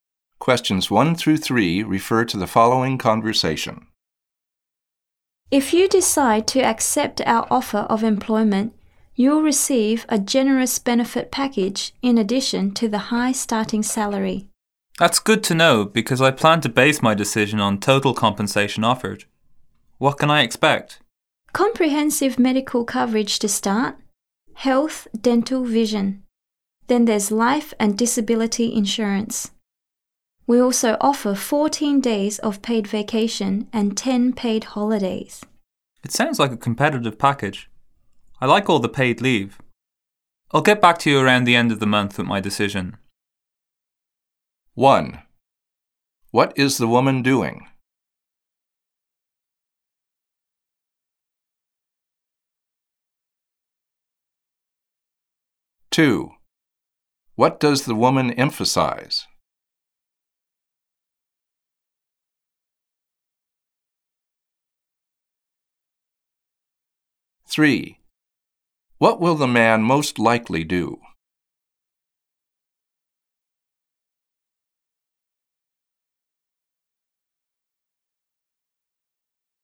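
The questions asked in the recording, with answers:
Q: What will the man most likely do?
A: Give his decision around the end of the month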